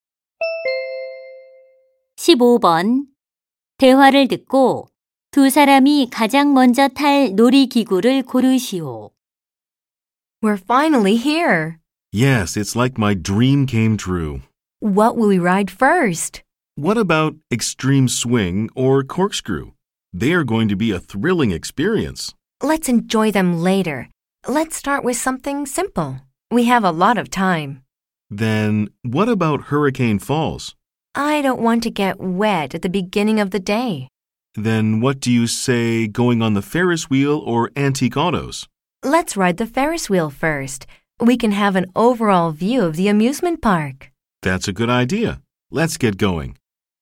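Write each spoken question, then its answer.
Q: 대화를 듣고 두 사람이 가장 먼저 탈 놀이기구를 고르시오.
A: 대관람차(Ferris wheel)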